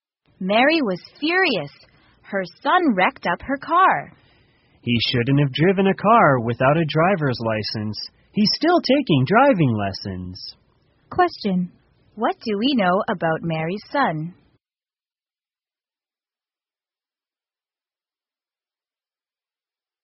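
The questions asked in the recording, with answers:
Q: What do we know about Mary's son?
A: He wrecked her car while driving without a driver's license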